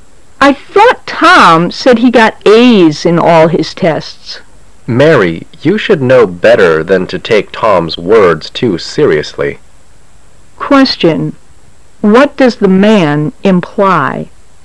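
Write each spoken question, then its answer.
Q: What does the man imply?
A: Tom's words can't be trusted

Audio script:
[解析] W: I thought Tom said he got A's in all his tests. M: Mary, you should know better than to take Tom's words too seriously. Q: What does the man imply?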